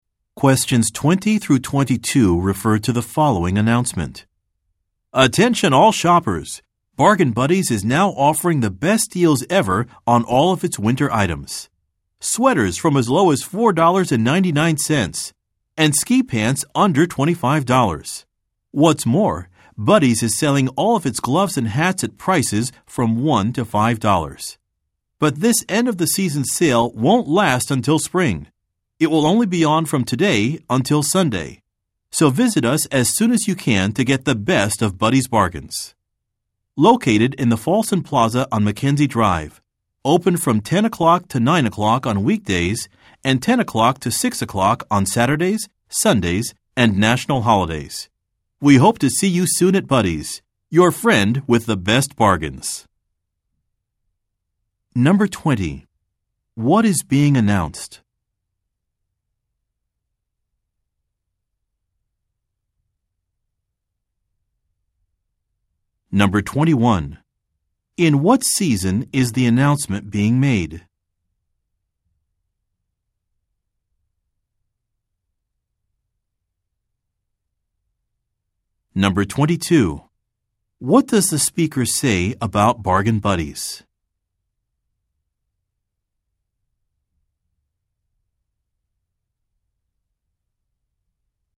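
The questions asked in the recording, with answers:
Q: What is being announced?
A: A sale on winter items

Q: In what season is the announcement being made?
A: Winter (end of the season)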